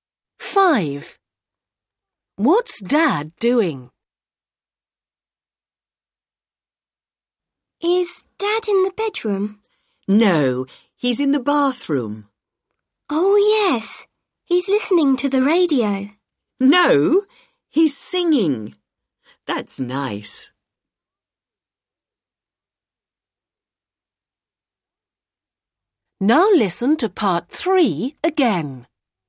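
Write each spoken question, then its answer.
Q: What's Dad doing?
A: Singing in the bathroom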